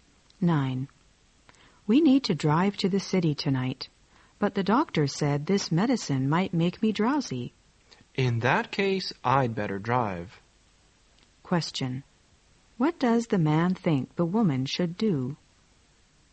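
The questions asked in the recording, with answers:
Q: What does the man think the woman should do?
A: Not drive; let him drive.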